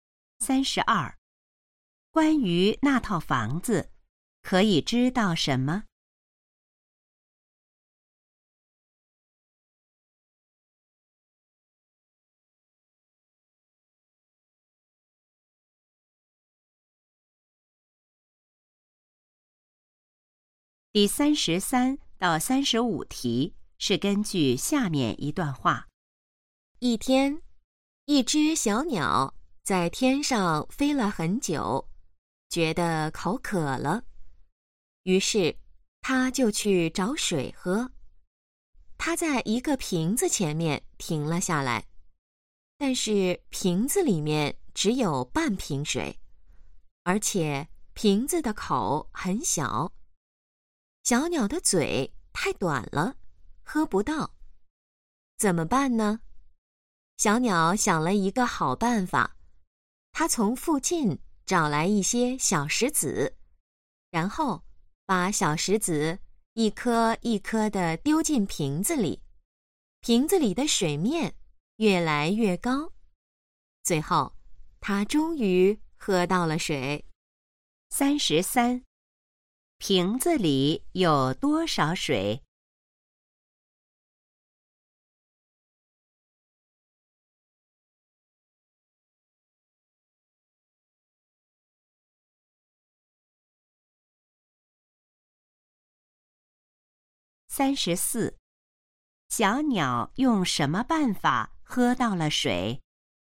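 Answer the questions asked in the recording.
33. 半瓶水
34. 把小石子一颗一颗丢进瓶子里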